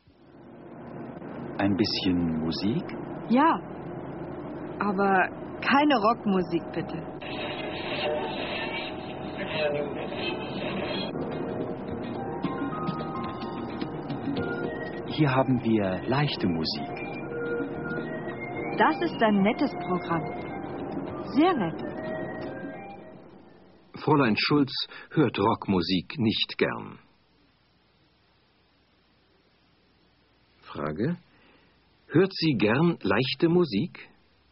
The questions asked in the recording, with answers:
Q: Hört sie gern leichte Musik?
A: Ja, sie hört leichte Musik gern.